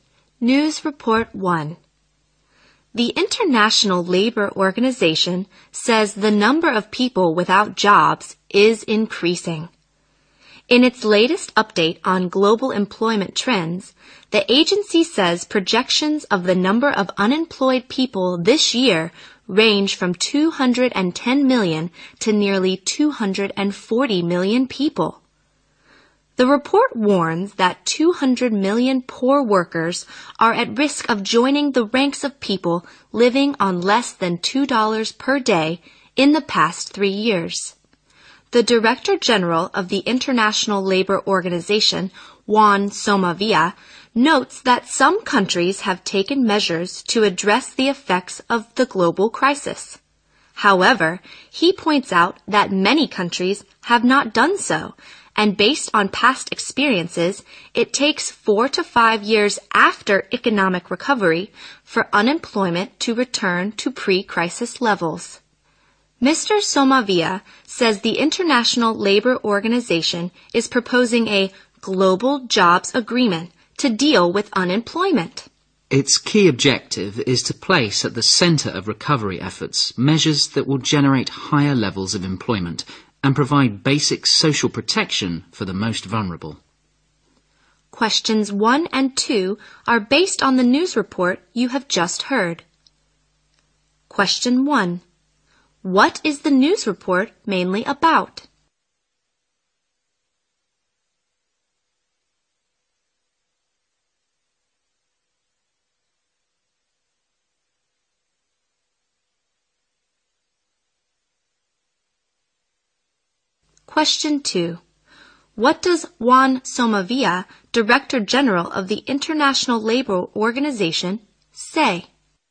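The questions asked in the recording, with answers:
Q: What is the news report mainly about?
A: The number of unemployed people worldwide is rising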